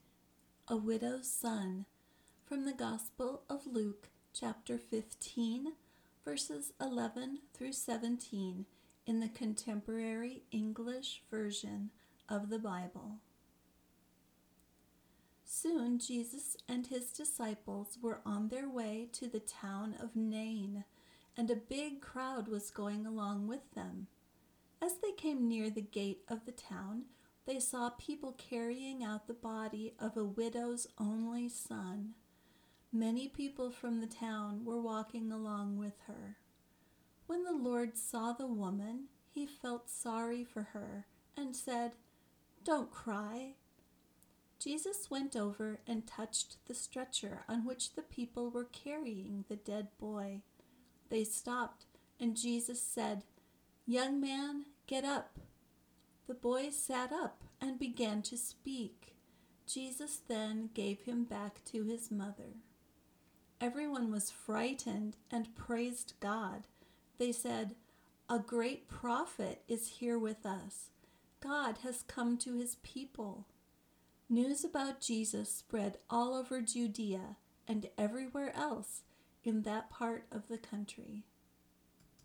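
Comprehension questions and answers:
First, be prepared to find the answers to these four questions as you listen:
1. What is Nain?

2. What did Jesus say to the boy's mother?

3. What did the boy do after Jesus spoke to him?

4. What spread all over Judea?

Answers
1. A town
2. Don't cry.
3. He sat up and began to speak.
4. News about Jesus

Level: Advanced Beginner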